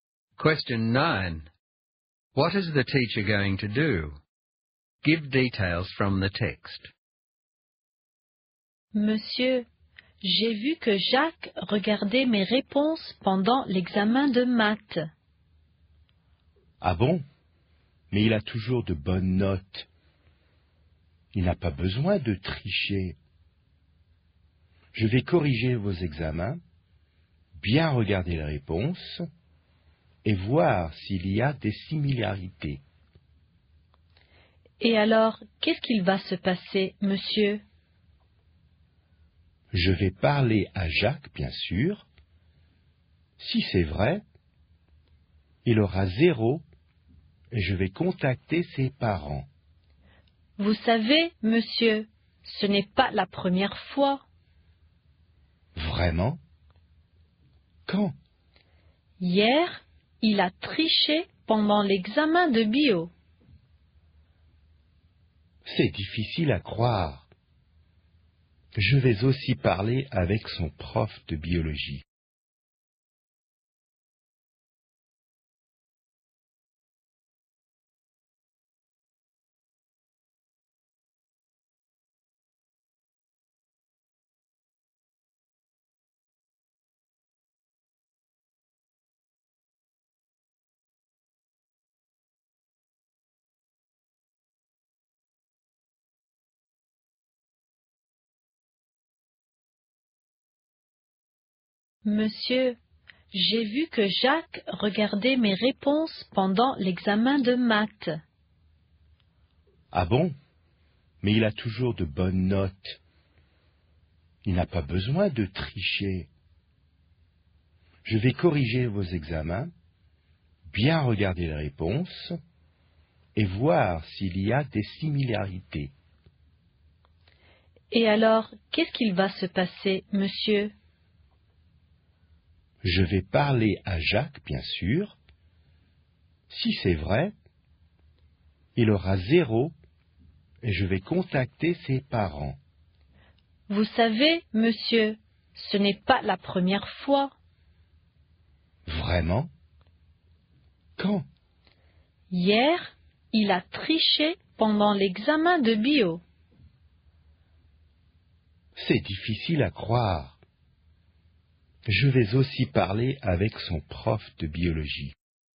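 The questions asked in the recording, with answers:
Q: What is the teacher going to do?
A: Mark the exams and compare answers for similarities, talk to Jacques, give him zero and contact his parents if it's true, and talk to his biology teacher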